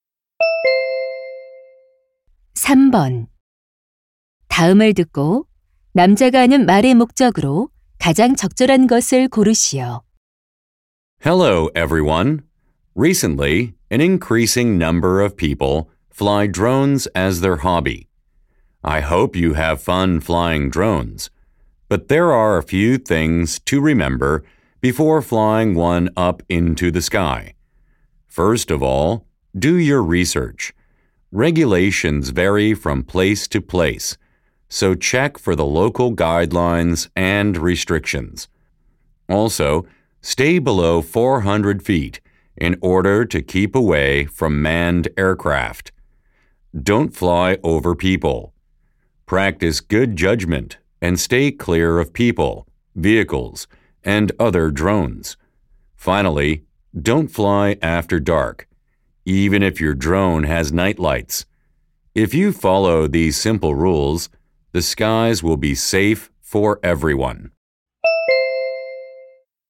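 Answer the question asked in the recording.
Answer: 드론을 안전하게 날리기 위한 수칙을 알려 주려고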